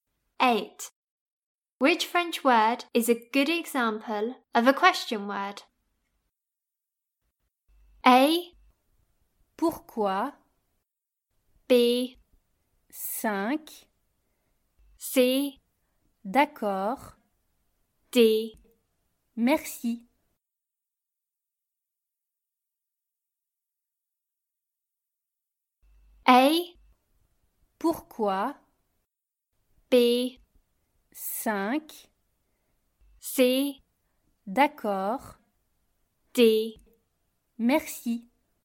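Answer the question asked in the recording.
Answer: A: Pourquoi?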